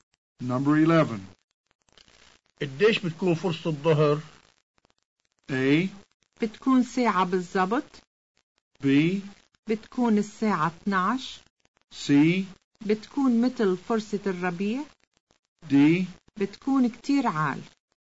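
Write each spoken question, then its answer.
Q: قديش بتكون فرصة الظهر؟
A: A: بتكون ساعة بالزبط.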